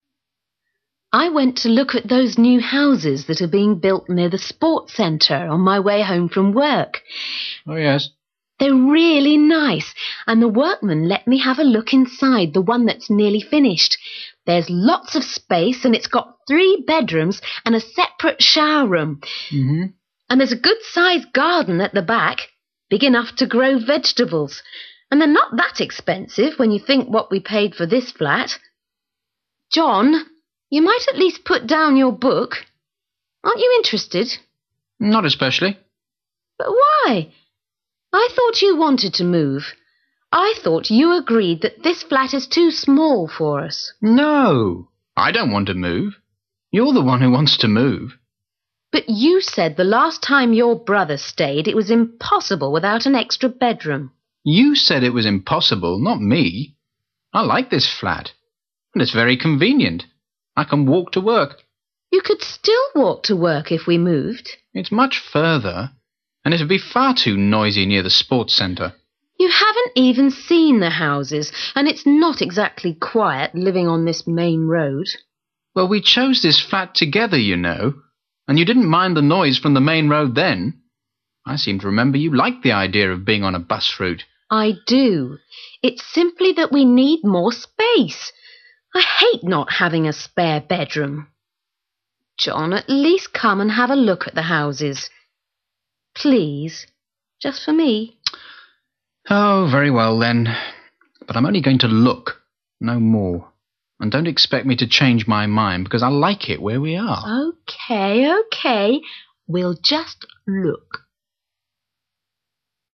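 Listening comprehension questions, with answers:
Decide if you think each statement is correct or incorrect. If it is correct, mark A. If it is not correct, mark В.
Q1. The woman is keen on moving.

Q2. The man has been reading while she's been talking.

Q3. The man agrees that their flat is small.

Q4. The man likes their flat because it's quiet.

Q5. The woman persuades the man to look at a house.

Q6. The man changes his mind about moving.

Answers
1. A
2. A
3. B
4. B
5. A
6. B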